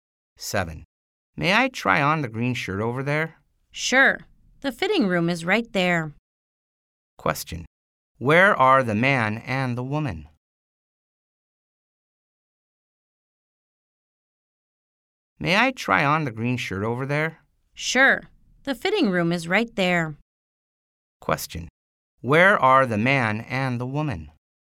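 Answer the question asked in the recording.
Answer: In a clothing store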